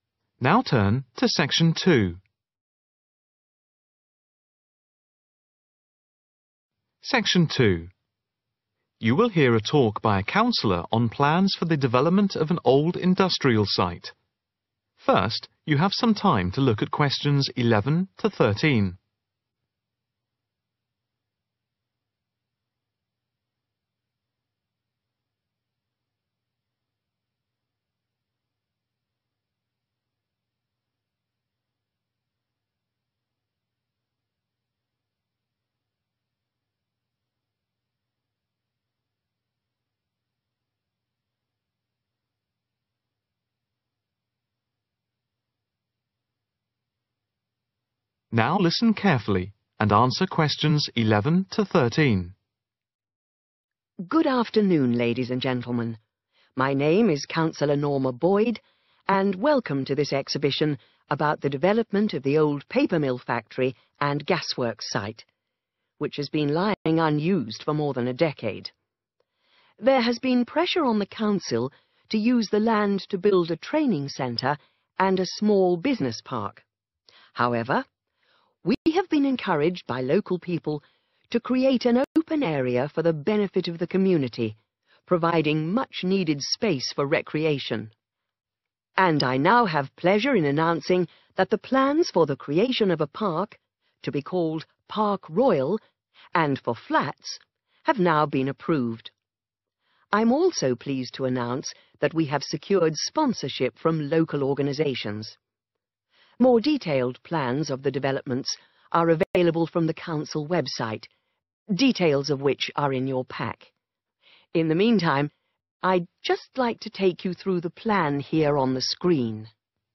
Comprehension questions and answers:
Write NO MORE THAN TWO WORDS for each answer.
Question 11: The land for development has not been used for over a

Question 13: Sponsorship has been received from a number of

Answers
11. decade
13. local organisation